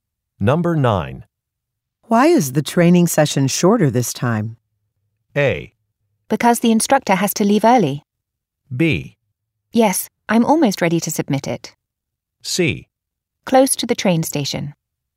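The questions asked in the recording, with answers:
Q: Why is the training session shorter this time?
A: A: Because the instructor has to leave early.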